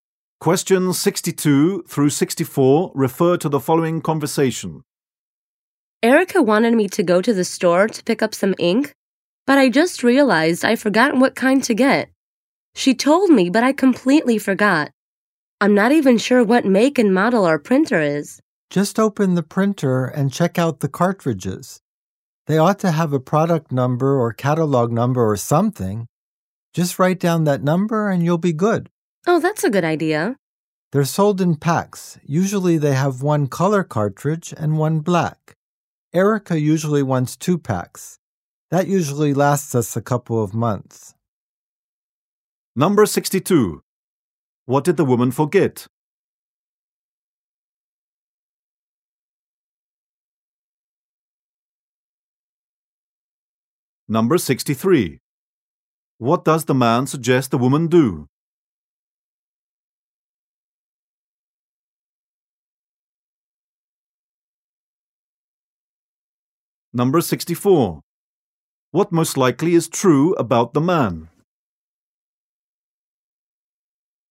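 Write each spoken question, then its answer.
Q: What did the woman forget?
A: What kind of ink to get

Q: What does the man suggest the woman do?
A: Check the cartridges for a product number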